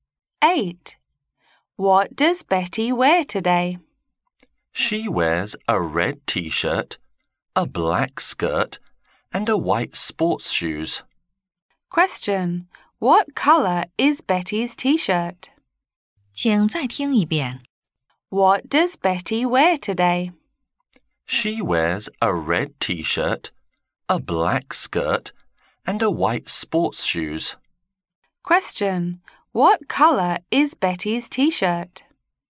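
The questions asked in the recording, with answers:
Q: What colour is Betty's T-shirt?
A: Red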